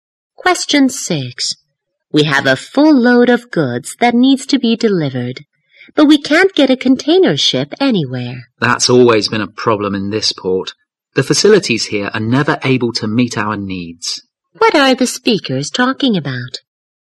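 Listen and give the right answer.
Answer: Not being able to get a container ship to deliver goods from the port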